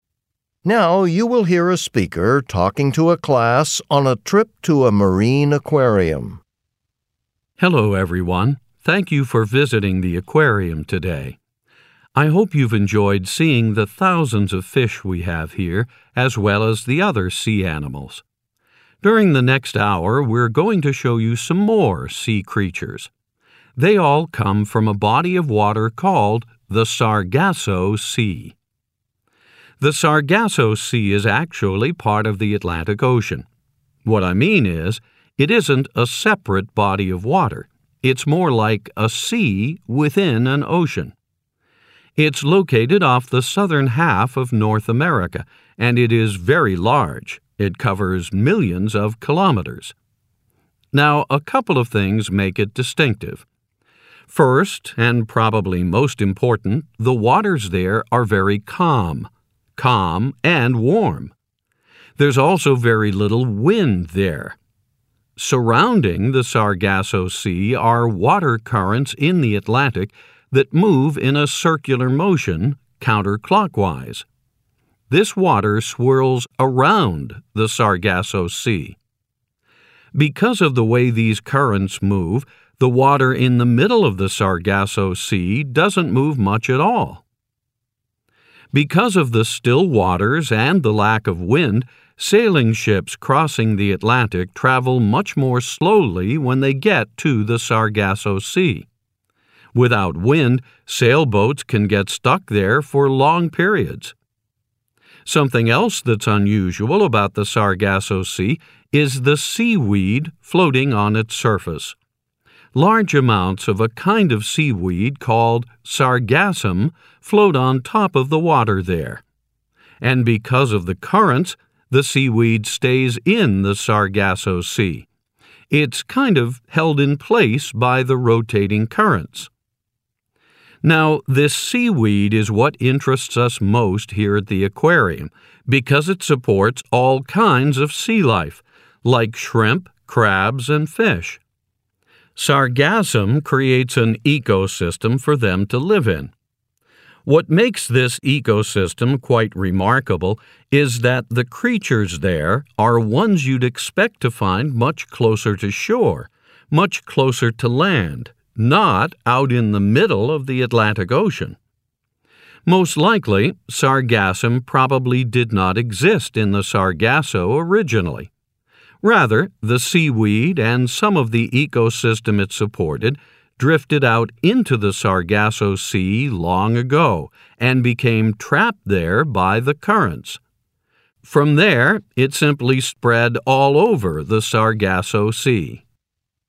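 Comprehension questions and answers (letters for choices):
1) According to the speaker, what do certain currents in the Atlantic Ocean do?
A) They cause the Sargasso Sea to become smaller and smaller over time.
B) They keep the water in the middle of the Sargasso Sea from moving much.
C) They make fish from the Sargasso Sea drift to other places.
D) They prevent seaweed in the Sargasso Sea from being eaten by sea creatures.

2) What is the speaker explaining when he mentions sailing ships?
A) How the Sargasso Sea was discovered.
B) How seaweed got into the Sargasso Sea.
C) How unusual the water in the Sargasso Sea looks.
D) How little wind there is in the Sargasso Sea.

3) What is sargassum?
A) A species of fish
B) A kind of seaweed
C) A fast-moving current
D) A slow-moving sailing ship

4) According to the speaker, what is surprising about some animal species that live in the Sargasso Sea?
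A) They have short life spans.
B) They are larger than expected.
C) They are usually found closer to land.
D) They are not native to the Atlantic Ocean.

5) What is the speaker mainly talking about?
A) An unusual part of the Atlantic Ocean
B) A kind of seaweed that is eaten by most fish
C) The discovery of an uncommon type of seaweed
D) A kind of sea animal that lives only in the Atlantic Ocean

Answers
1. B
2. D
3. B
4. C
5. A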